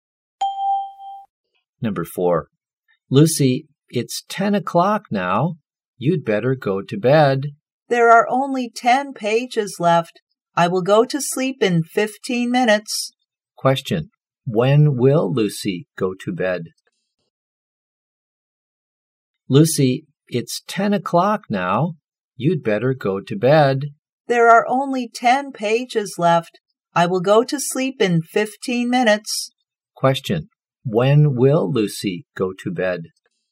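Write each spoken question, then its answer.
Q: When will Lucy go to bed?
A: At 10:15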